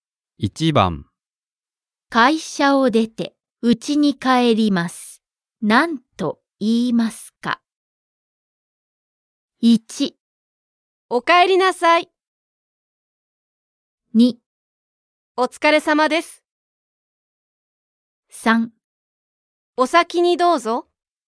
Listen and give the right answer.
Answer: Choice 2. お疲れ様です。